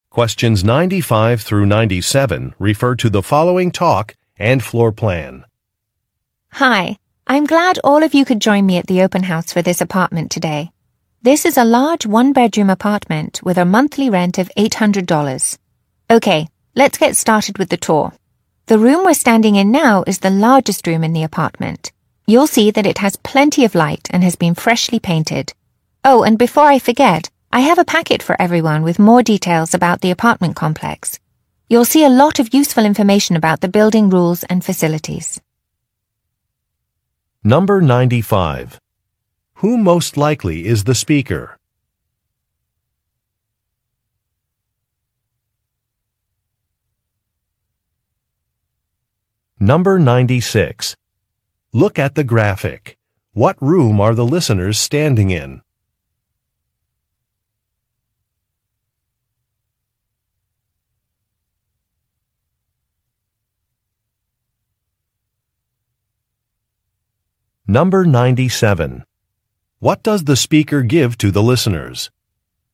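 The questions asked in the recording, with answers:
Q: Who most likely is the speaker?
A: A real estate agent showing an apartment

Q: What does the speaker give to the listeners?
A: A packet with details about the apartment complex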